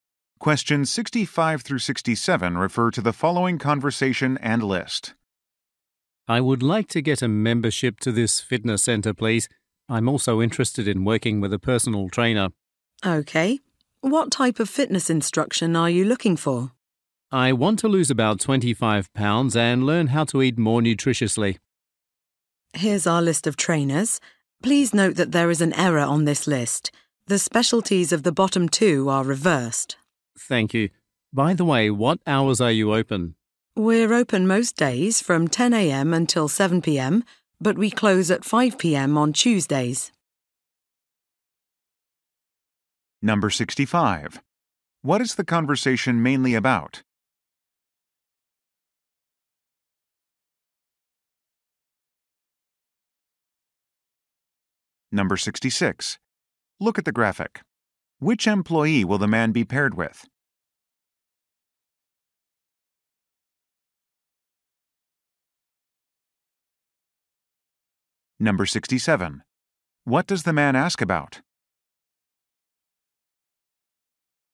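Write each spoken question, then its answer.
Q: What is the conversation mainly about?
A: Signing up for a fitness center membership and personal trainer.

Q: What does the man ask about?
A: The opening hours.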